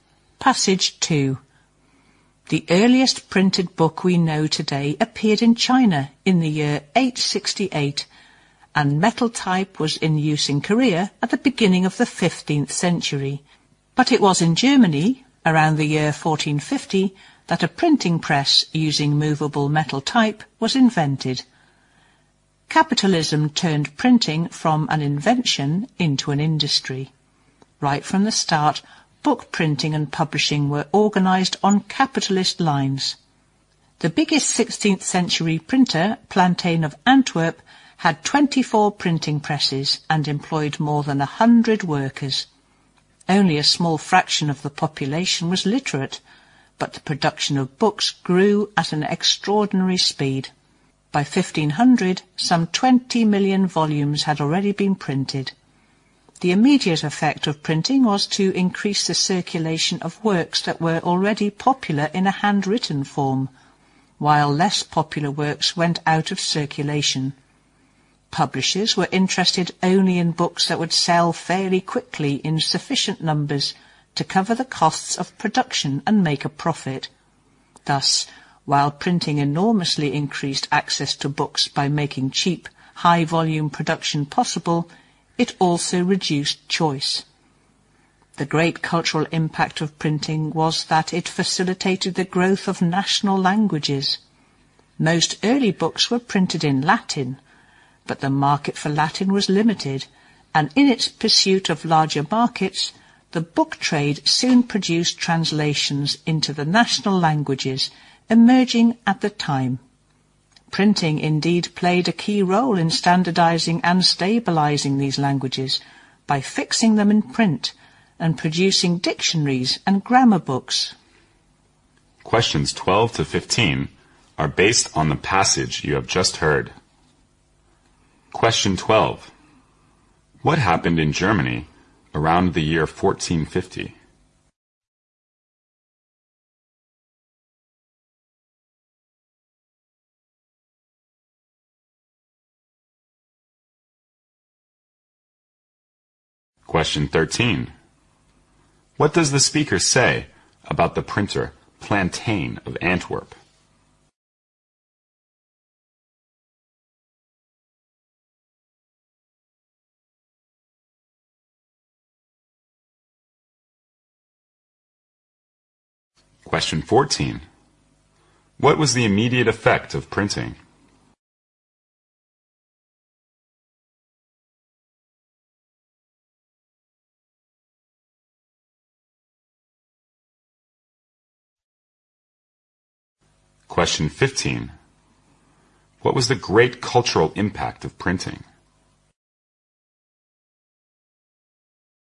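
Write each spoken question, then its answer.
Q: What happened in Germany around the year 1450?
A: A printing press using movable metal type was invented.

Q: What does the speaker say about the printer Plantain of Antwerp?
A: He was the biggest 16th century printer, with 24 presses and more than 100 workers.

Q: What was the immediate effect of printing?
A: Works already popular in handwritten form circulated more widely, while less popular works went out of circulation.

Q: What was the great cultural impact of printing?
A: It helped national languages grow.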